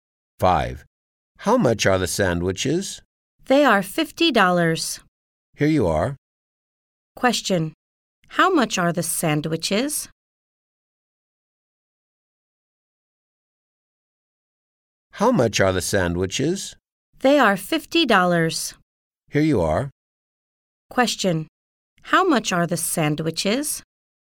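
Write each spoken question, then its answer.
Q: Question. How much are the sandwiches?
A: $50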